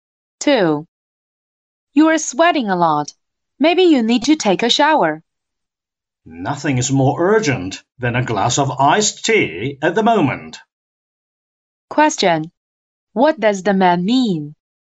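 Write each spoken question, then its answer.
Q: What does the man mean?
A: He wants a glass of iced tea before anything else.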